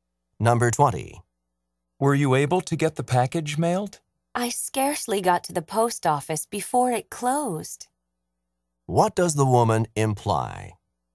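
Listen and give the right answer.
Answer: She barely made it to the post office in time and mailed the package.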